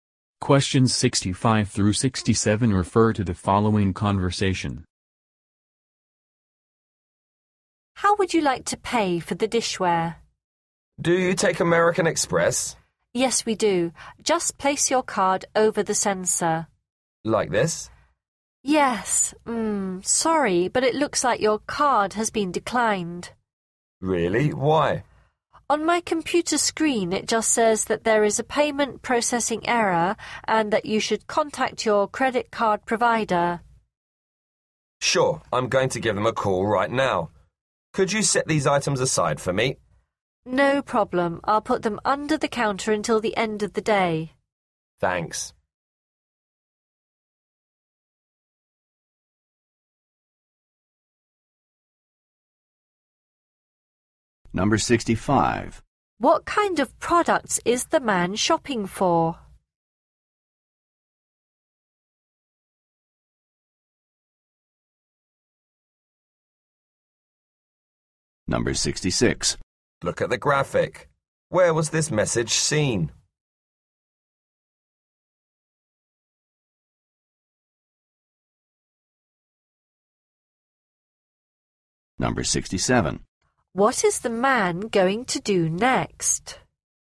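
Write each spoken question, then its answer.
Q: What kind of products is the man shopping for?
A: Dishware

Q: What is the man going to do next?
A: Call his credit card provider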